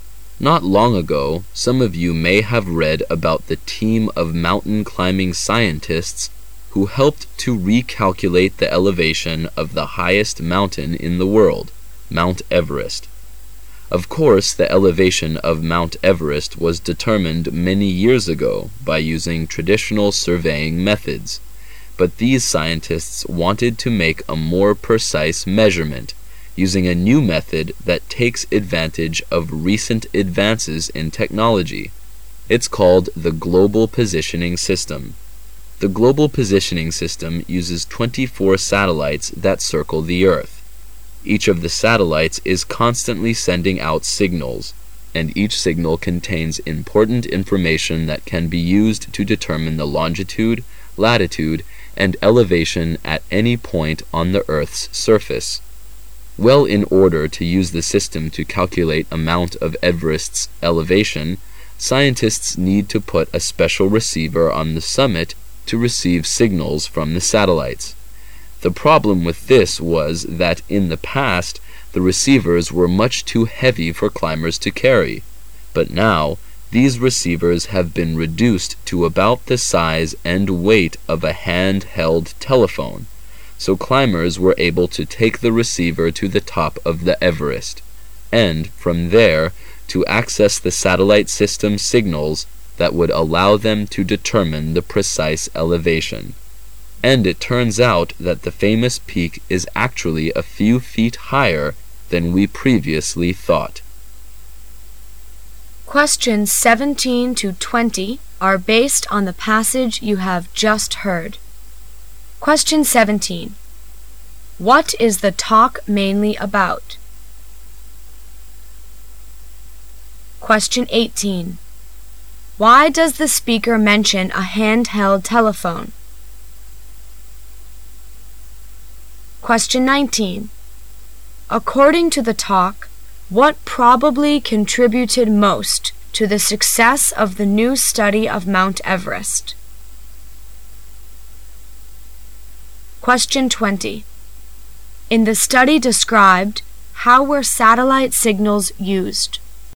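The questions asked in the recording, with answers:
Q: What is the talk mainly about?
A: Using the Global Positioning System to remeasure the elevation of Mount Everest

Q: Why does the speaker mention a handheld telephone?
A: To show how small and light the receivers have become

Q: According to the talk, what probably contributed most to the success of the new study of Mount Everest?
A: Receivers light enough for climbers to carry to the summit

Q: In the study described, how were satellite signals used?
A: To determine the precise elevation of the summit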